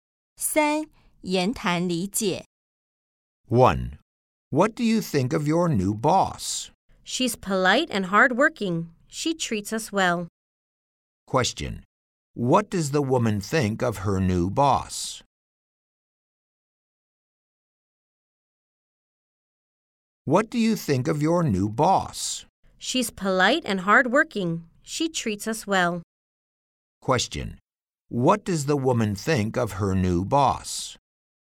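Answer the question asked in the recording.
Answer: She's polite and hardworking.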